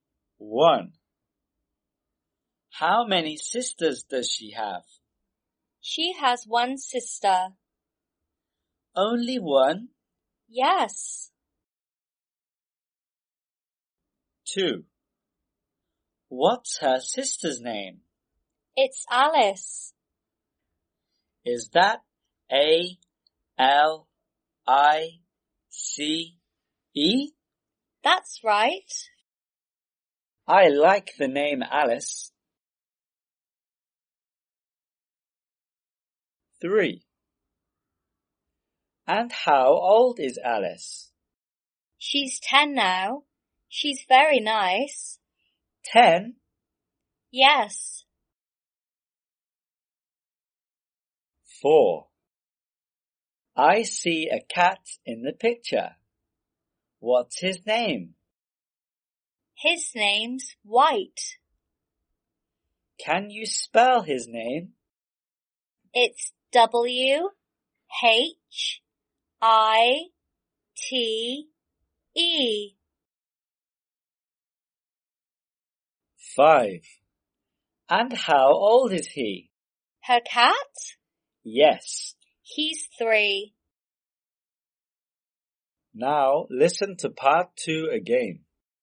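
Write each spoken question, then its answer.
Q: What's her sister's name?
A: Alice

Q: And how old is Alice?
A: 10

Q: What's his name?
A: White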